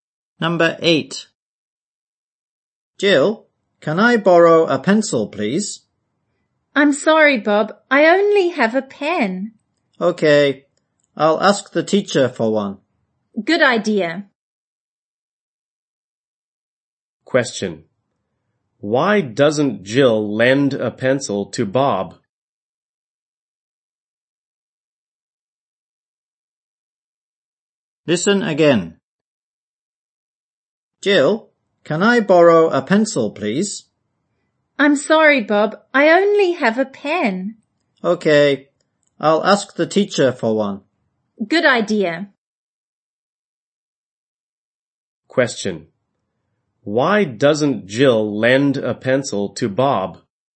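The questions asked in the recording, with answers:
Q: Why doesn't Jill lend a pencil to Bob?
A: She only has a pen.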